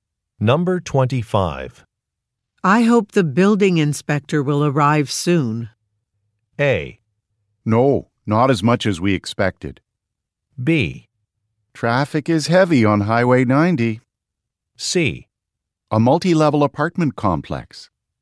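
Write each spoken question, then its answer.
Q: I hope the building inspector will arrive soon.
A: B: Traffic is heavy on Highway 90.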